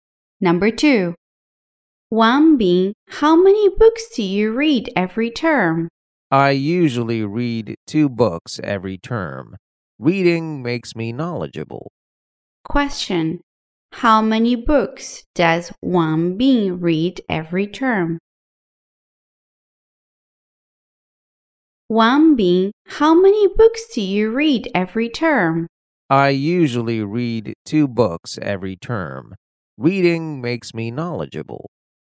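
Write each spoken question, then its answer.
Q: Question, how many books does Wanbin read every term?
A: Two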